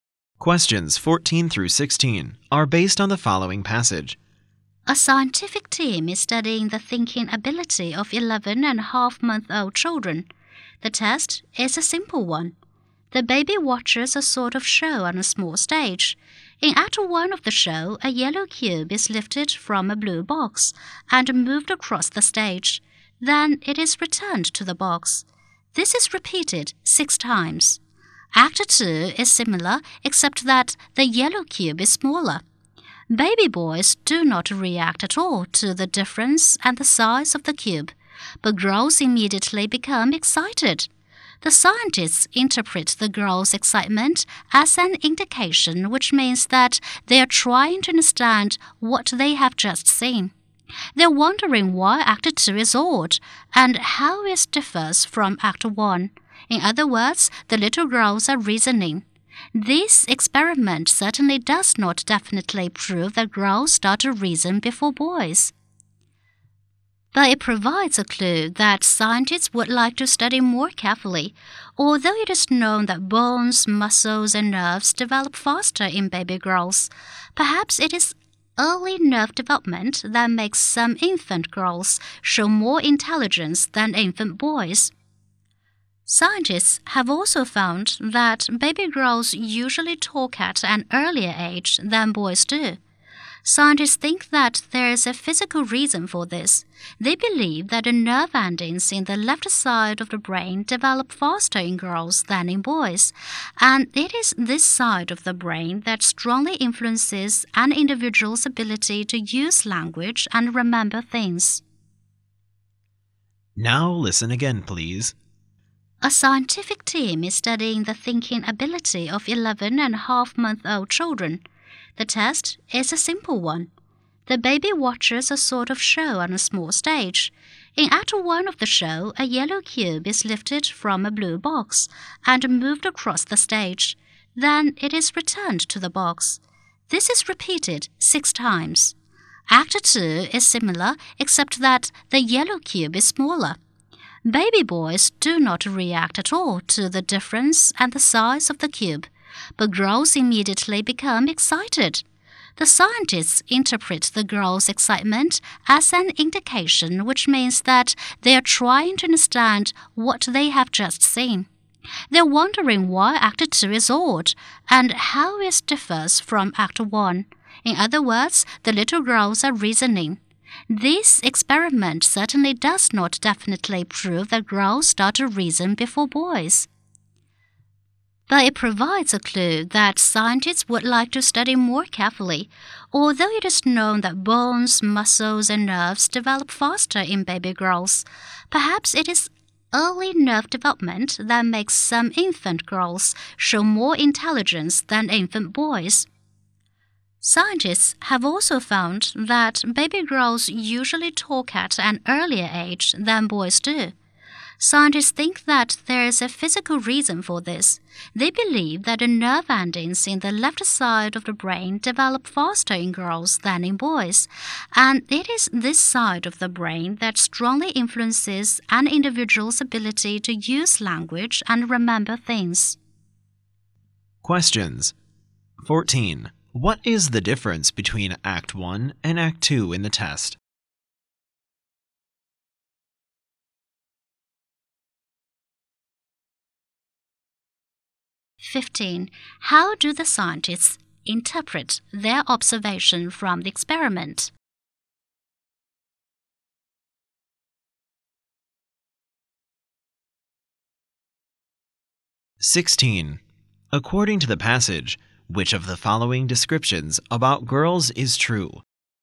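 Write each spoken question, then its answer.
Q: What is the difference between Act 1 and Act 2 in the test?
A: The yellow cube is smaller in Act 2

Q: How do the scientists interpret their observation from the experiment?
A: The girls are reasoning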